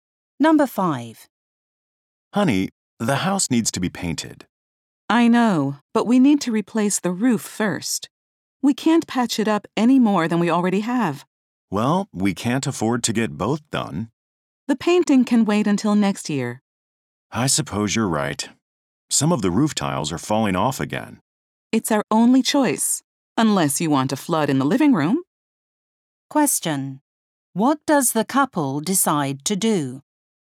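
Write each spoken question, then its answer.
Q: What does the couple decide to do?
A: Replace the roof first and paint the house next year.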